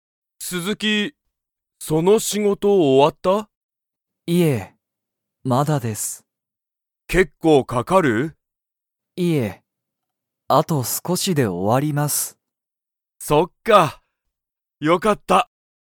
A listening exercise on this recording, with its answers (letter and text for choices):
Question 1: 鈴木すずきさんの仕事しごとは、____。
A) 全然ぜんぜん終おわらない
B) 後少あとすこしで終おわる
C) もう終おわってる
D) 今いまちょうど終おわった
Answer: B) 後少あとすこしで終おわる

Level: Level 1